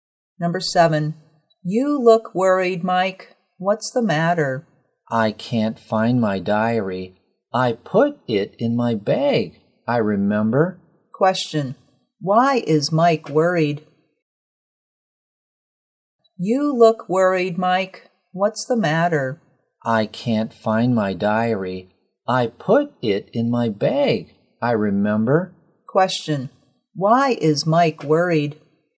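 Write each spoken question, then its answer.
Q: Question,Why is Mike worried?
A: He can't find his diary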